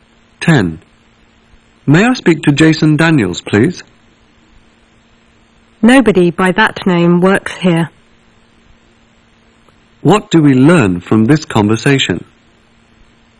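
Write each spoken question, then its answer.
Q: What do we learn from this conversation?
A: Jason Daniels doesn't work there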